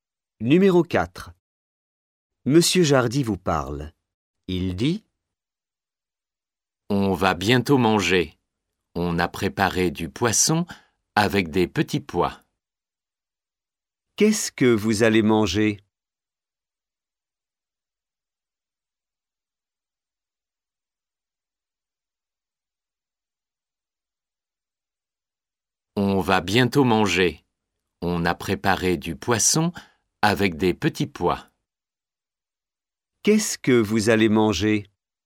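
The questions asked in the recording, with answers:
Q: Qu'est-ce que vous allez manger ?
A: Du poisson avec des petits pois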